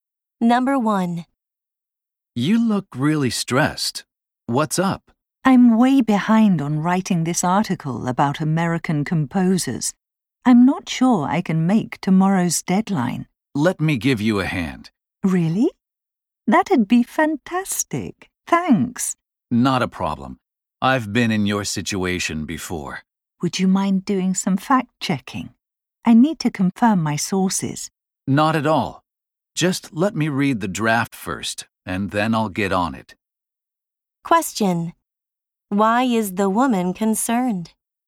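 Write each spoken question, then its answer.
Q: Why is the woman concerned?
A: She may miss tomorrow's deadline for her article on American composers.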